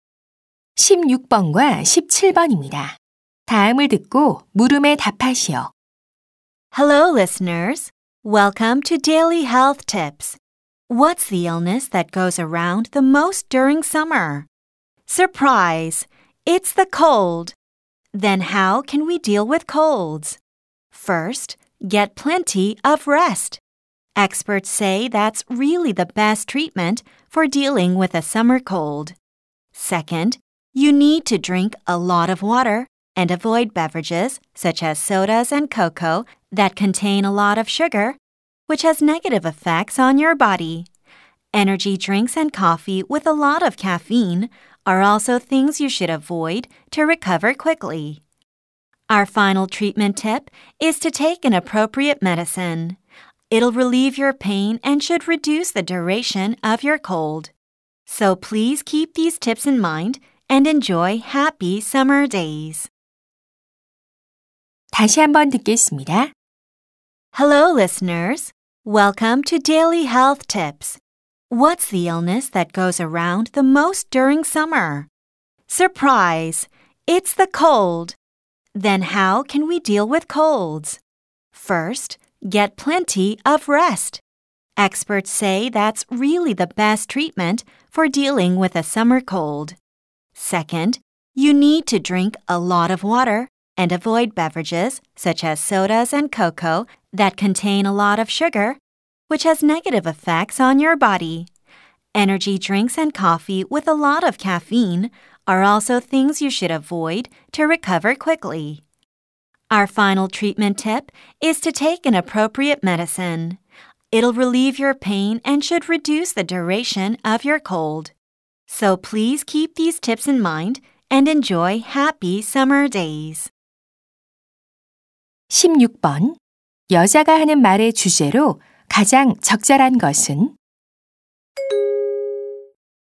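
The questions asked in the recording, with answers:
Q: 여자가 하는 말의 주제로 가장 적절한 것은?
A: 여름 감기를 치료하는 방법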